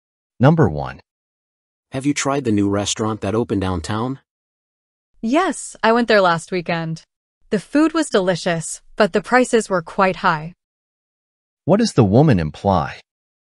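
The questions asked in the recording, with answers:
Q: What does the woman imply?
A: The restaurant's food is good but expensive.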